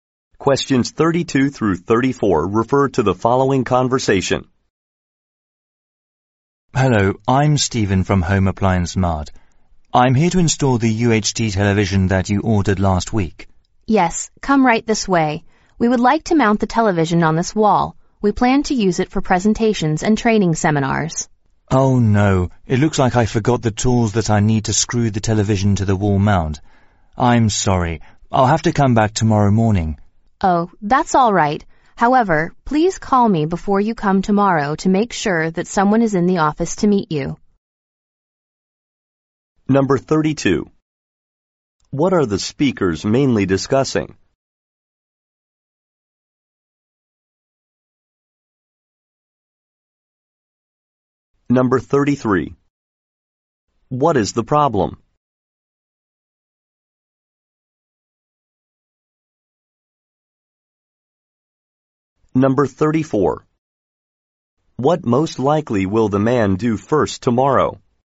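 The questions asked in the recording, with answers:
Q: What are the speakers mainly discussing?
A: Installing a television

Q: What is the problem?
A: The man forgot his tools

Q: What most likely will the man do first tomorrow?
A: Call the woman before coming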